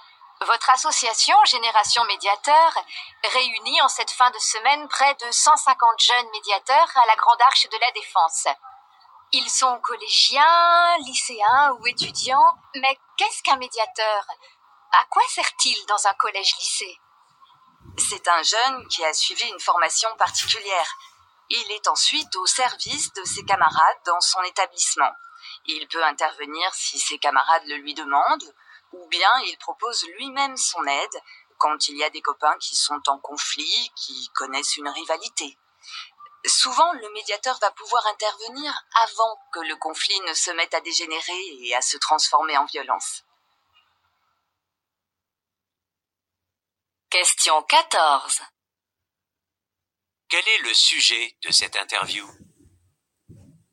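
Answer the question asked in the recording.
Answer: Le rôle des jeunes médiateurs dans les établissements scolaires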